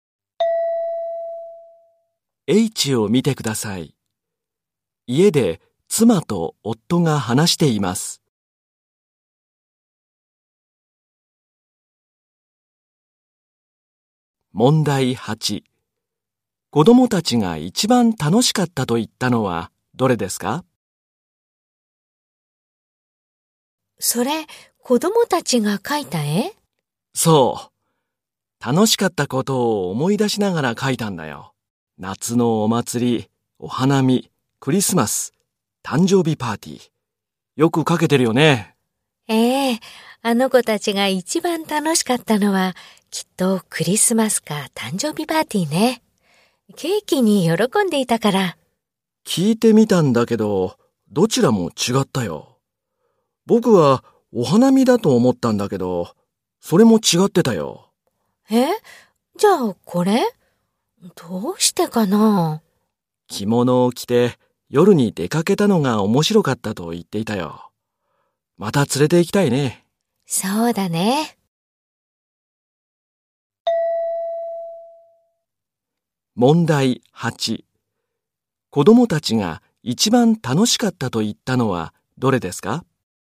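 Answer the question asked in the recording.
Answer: 夏のお祭り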